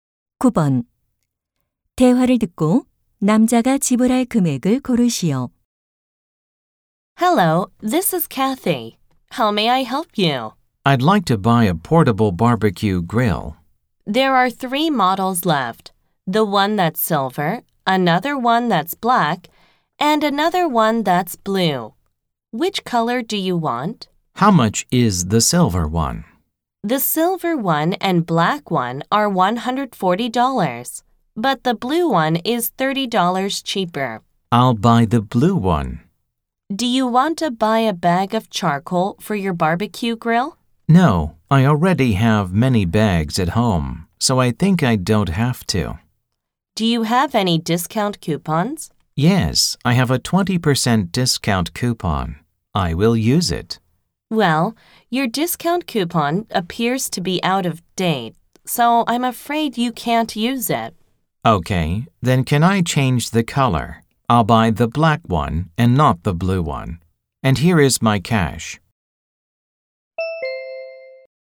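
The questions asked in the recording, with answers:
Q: 대화를 듣고 남자가 지불할 금액을 고르시오.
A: 140달러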